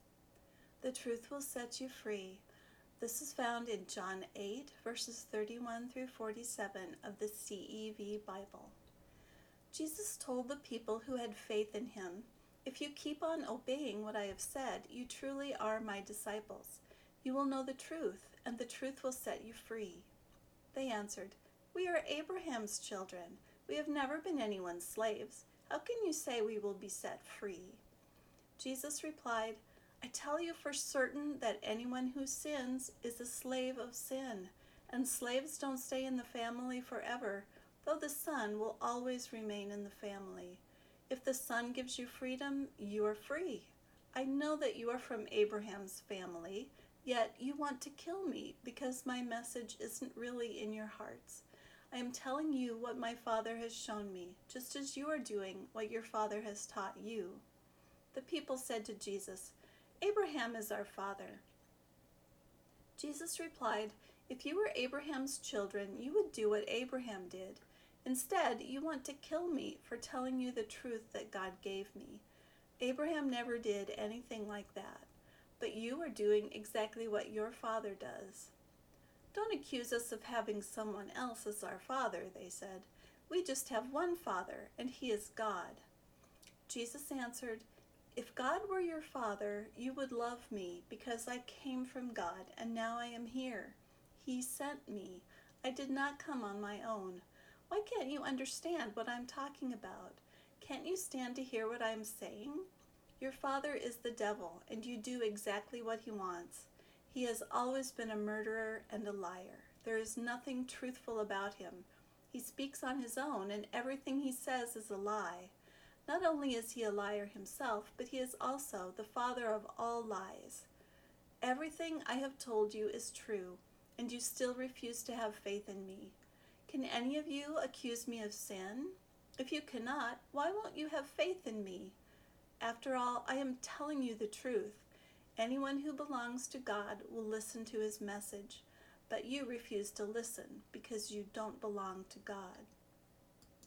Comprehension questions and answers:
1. How can people be set free?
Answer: People can be set free by knowing the truth.

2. Why did some people in the passage want to kill Jesus?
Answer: They did not believe what Jesus said.

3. Who is the father of the people who did not believe Jesus? How is it different than what they thought?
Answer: The devil was the father of the people

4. What is the devil like?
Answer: The devil is a murderer and a liar.

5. Who listens to God's message?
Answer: Those who belong to God listen to His message.

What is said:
The Truth Will Set You Free Reading Exercise
Jesus told the people who had faith in him, "If you keep on obeying what I have said, you truly are my disciples. You will know the truth, and the truth will set you free."
They answered, "We are Abraham's children! We have never been anyone's slaves. How can you say we will be set free?"
Jesus replied:
I tell you for certain that anyone who sins is a slave of sin! And slaves don't stay in the family forever, though the Son will always remain in the family. If the Son gives you freedom, you are free! I know that you are from Abraham's family. Yet you want to kill me, because my message isn't really in your hearts. I am telling you what my Father has shown me, just as you are doing what your father has taught you.
The people said to Jesus, "Abraham is our father!"
Jesus replied, "If you were Abraham's children, you would do what Abraham did. Instead, you want to kill me for telling you the truth that God gave me. Abraham never did anything like that. But you are doing exactly what your father does."
"Don't accuse us of having someone else as our father!" they said. "We just have one father, and he is God."
Jesus answered:
If God were your Father, you would love me, because I came from God and now I am here. He sent me. I did not come on my own. Why can't you understand what I am talking about? Can't you stand to hear what I am saying? Your father is the devil, and you do exactly what he wants. He has always been a murderer and a liar. There is nothing truthful about him. He speaks on his own, and everything he says is a lie. Not only is he a liar himself, but he is also the father of all lies.
Everything I have told you is true, and you still refuse to have faith in me. Can any of you accuse me of sin? If you cannot, why won't you have faith in me? Anyone who belongs to God will listen to his message. But you refuse to listen, because you don't belong to God.

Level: Advanced